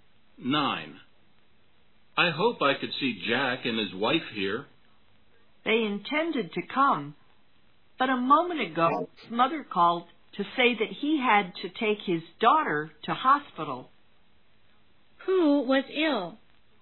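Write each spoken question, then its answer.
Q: Who was ill?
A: Jack's daughter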